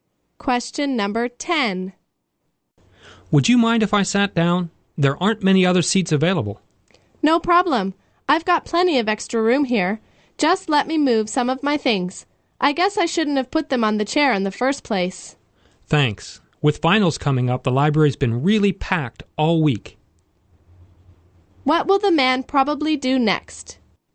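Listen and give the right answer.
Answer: Sit down in the chair after the woman moves her things.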